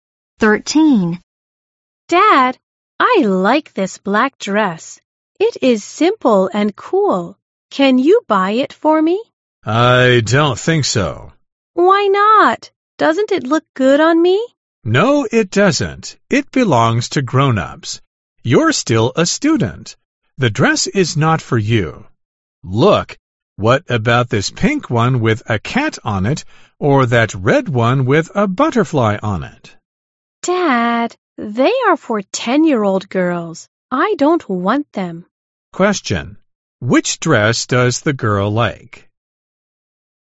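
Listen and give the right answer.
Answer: The black dress.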